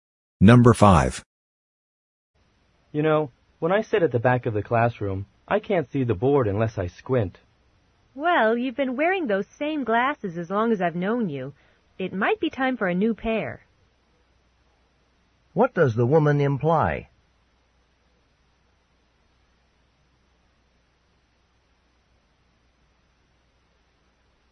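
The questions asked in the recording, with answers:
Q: What does the woman imply?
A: The man should get new glasses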